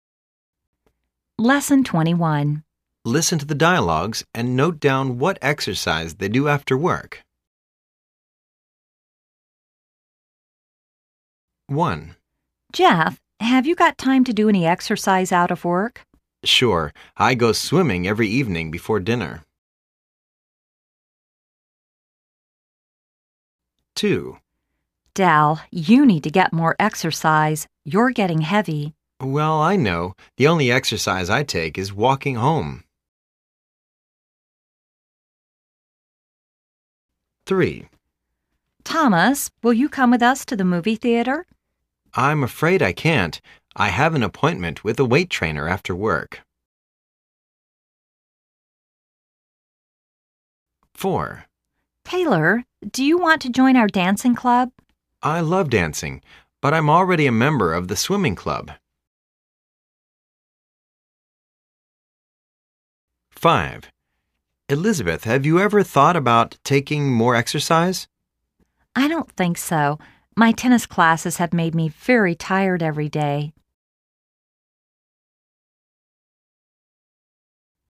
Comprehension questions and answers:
Listen to the dialogues and note down what exercise they do after work.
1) Jeff ___________________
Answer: go swimming

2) Dell ___________________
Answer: walking to home

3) Thomas ___________________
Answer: weig ht training

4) Taylor ___________________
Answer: go swimming

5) Elizabeth ___________________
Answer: play tennis